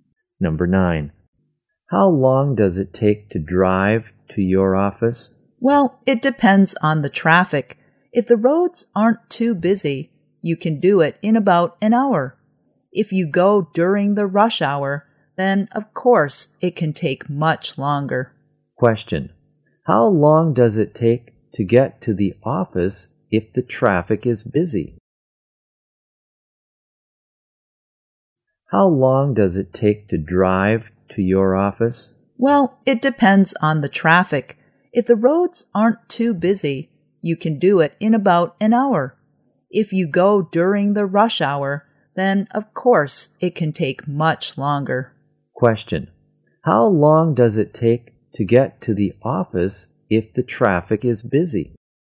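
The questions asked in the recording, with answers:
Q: How long does it take to get to the office if the traffic is busy?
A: Much longer than an hour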